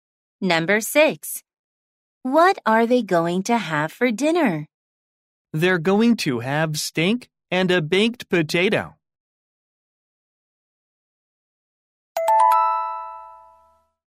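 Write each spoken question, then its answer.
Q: What are they going to have for dinner?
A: steak and a baked potato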